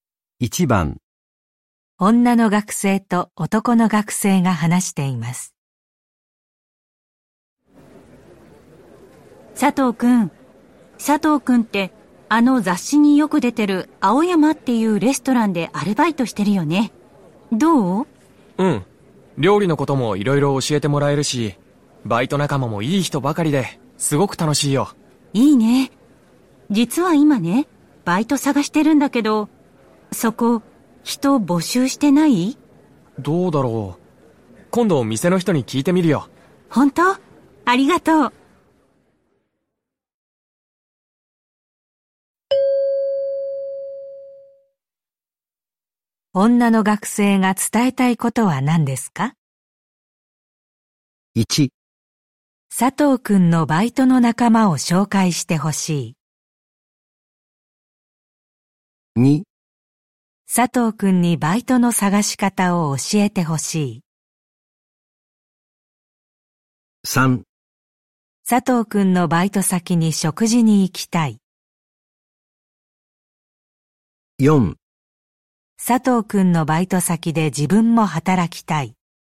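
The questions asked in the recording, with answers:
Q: 女の学生が伝えたいことは何ですか?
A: 4: 佐藤くんのバイト先で自分も働きたい。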